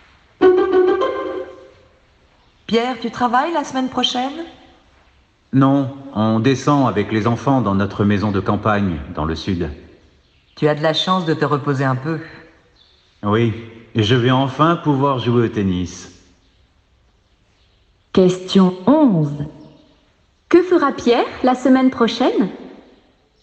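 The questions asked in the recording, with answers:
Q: Que fera Pierre la semaine prochaine ?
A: Il ira avec ses enfants dans sa maison de campagne, dans le sud, et jouera au tennis.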